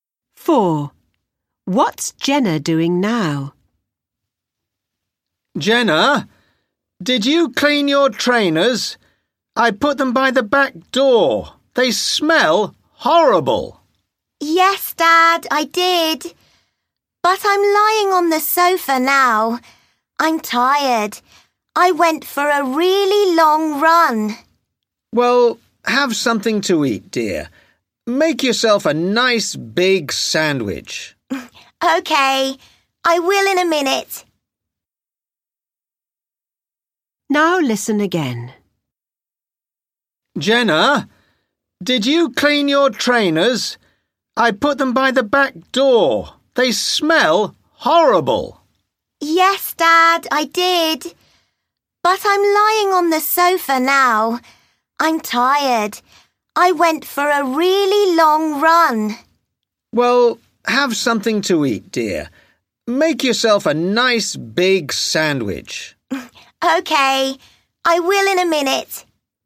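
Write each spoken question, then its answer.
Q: What's Jenna doing now?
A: Lying on the sofa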